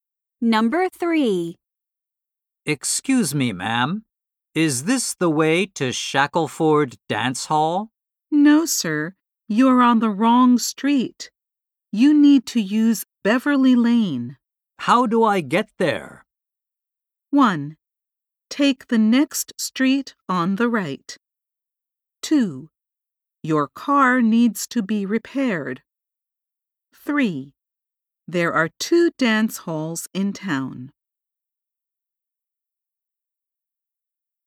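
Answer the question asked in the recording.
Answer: 1: Take the next street on the right.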